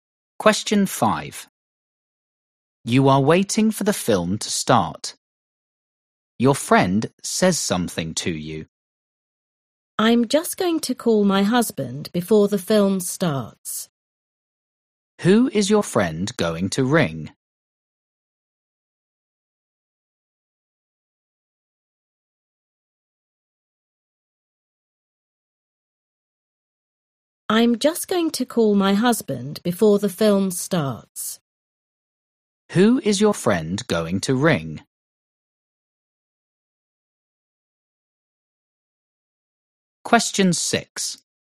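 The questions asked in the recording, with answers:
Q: Who is your friend going to ring?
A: Her husband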